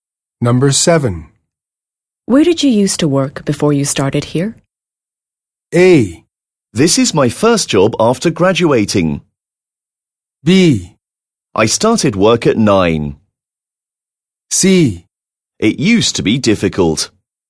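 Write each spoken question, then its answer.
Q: Where did you used to work before you started here?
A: A: This is my first job after graduating.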